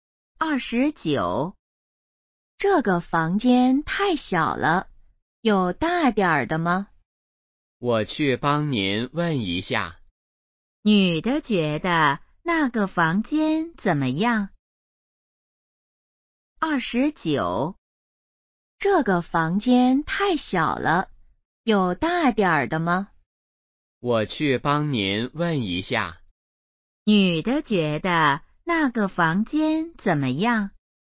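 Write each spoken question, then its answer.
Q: 女的觉得那个房间怎么样?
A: 太小了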